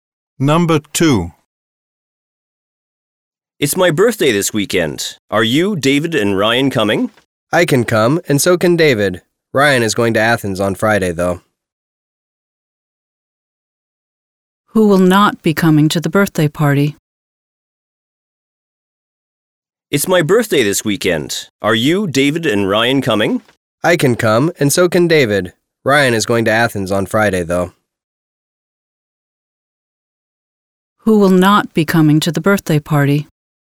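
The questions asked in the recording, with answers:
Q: Who will not be coming to the birthday party?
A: Ryan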